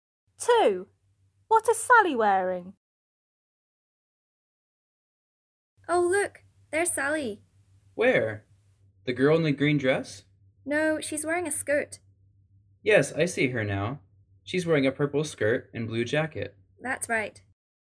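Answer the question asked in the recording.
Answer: A purple skirt and a blue jacket.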